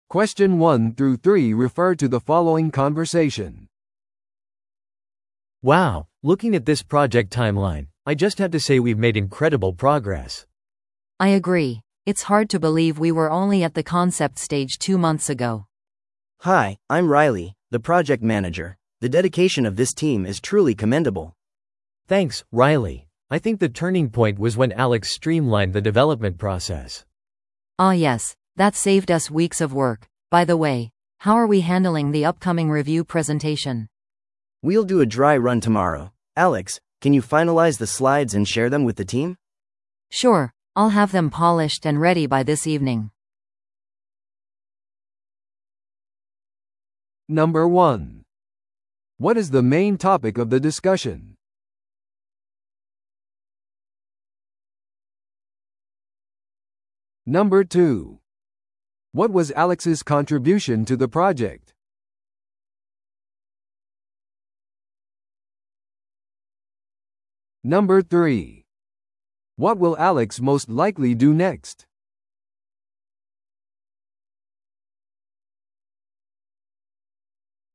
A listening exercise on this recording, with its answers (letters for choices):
Listen to the audio below and answer the questions.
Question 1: What is the main topic of the discussion?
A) チームの迅速な開発進捗。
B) プロジェクトタイムラインの最近の変更。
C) プロジェクトマネージャーとしてのRileyの新しい役割。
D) レビュープレゼンテーションの最終決定。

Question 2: What was Alex's contribution to the project?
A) マネージャーとしてプロジェクトをリードする。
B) コンセプト段階の導入。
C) 開発プロセスの効率化。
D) チームの献身的な取り組みを称賛する。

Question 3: What will Alex most likely do next?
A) チームとタイムラインを確認する。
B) プレゼンテーションのためのスライドを準備して共有する。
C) プロジェクト進行に関するフィードバックを与える。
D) チームミーティングを組織する。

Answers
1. A
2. C
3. B

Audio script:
A: Wow, looking at this project timeline, I just have to say we've made incredible progress!
B: I agree. It's hard to believe we were only at the concept stage two months ago.
C: Hi, I'm Riley, the project manager. The dedication of this team is truly commendable.
A: Thanks, Riley. I think the turning point was when Alex streamlined the development process.
B: Ah yes, that saved us weeks of work. By the way, how are we handling the upcoming review presentation?
C: We'll do a dry run tomorrow. Alex, can you finalize the slides and share them with the team?
B: Sure, I'll have them polished and ready by this evening.